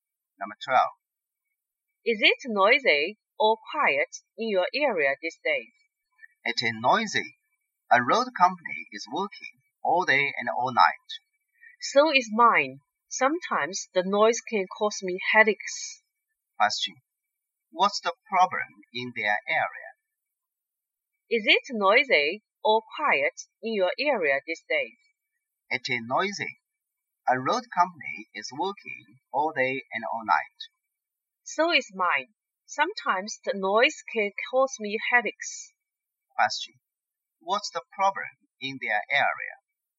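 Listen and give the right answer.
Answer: It is noisy because of road work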